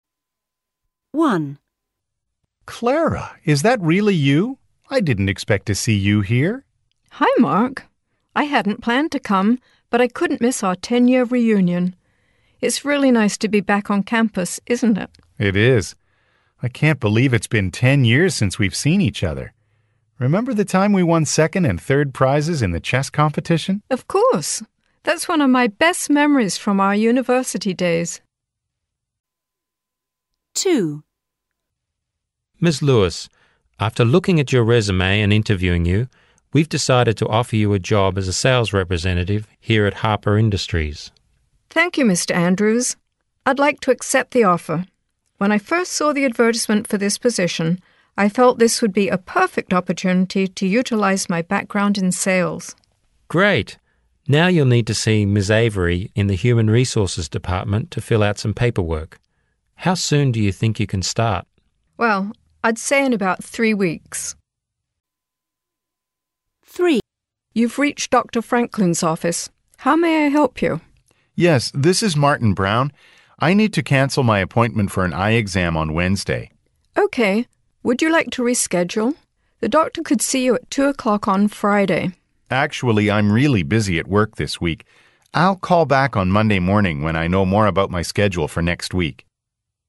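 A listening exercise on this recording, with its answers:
Task 2: Listen to the conversation and choose the best answer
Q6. How do speakers know each other?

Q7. How many years ago did the speakers last see each other?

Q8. What does the woman say is one of her favourite memories?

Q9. What kind of the employee will the business hire?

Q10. Why must Ms. Lewis visit the human resources department?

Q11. When does Ms.Lewis say she could start working?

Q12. Why did the man call?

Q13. What does the woman offer to do for the caller?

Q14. Why does the man decide to call back later?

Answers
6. They studied at the same university.
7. 10 years
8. Winning prizes in a chess competition
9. A sales representative
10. To fill out some paperwork
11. In about 3 weeks
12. To cancel his appointment for an eye exam
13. Reschedule the appointment for Friday at 2 o'clock
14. He is busy at work and doesn't know his schedule for next week yet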